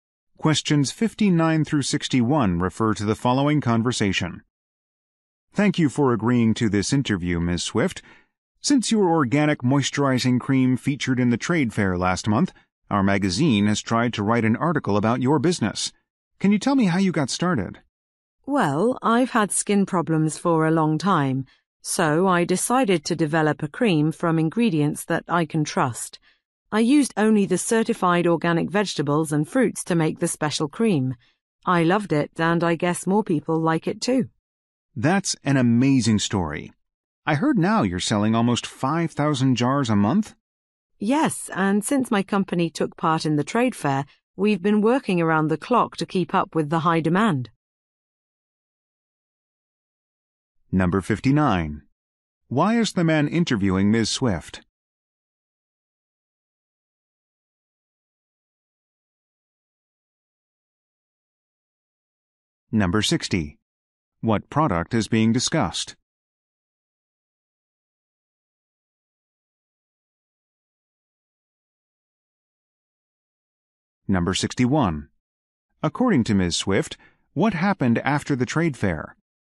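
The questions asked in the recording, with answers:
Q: Why is the man interviewing Ms.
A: To write a magazine article about her business

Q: What product is being discussed?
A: Organic moisturizing cream

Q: According to Ms.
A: Demand rose and they work around the clock to keep up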